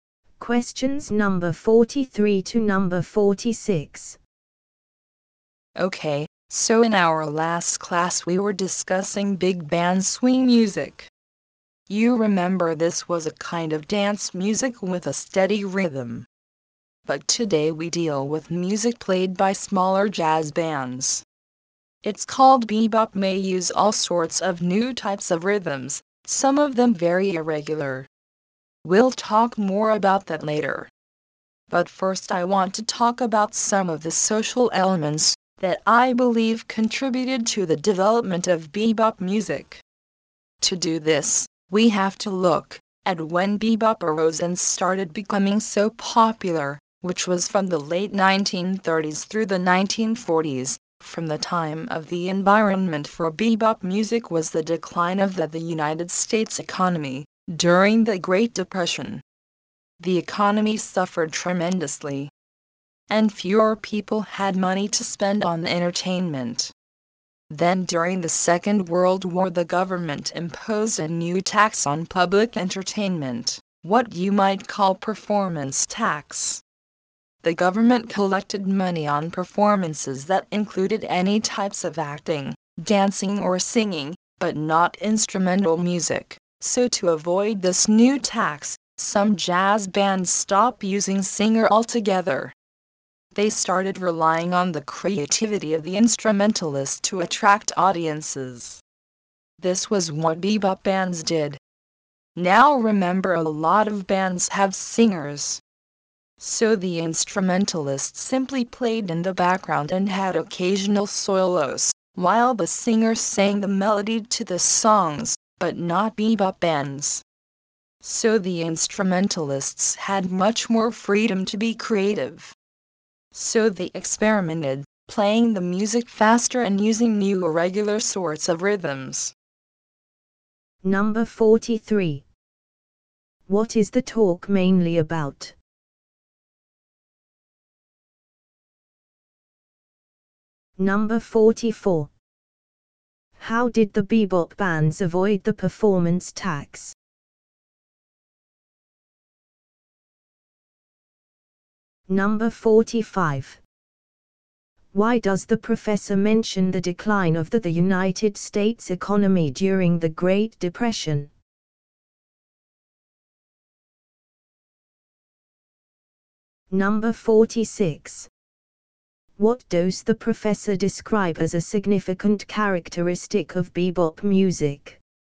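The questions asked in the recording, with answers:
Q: What is the talk mainly about?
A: Social factors behind the development of bebop music

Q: How did the bebop bands avoid the performance tax?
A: They stopped using singers

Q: Why does the professor mention the decline of the United States economy during the Great Depression?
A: To describe the environment in which bebop developed

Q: What does the professor describe as a significant characteristic of bebop music?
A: Fast playing with new, irregular rhythms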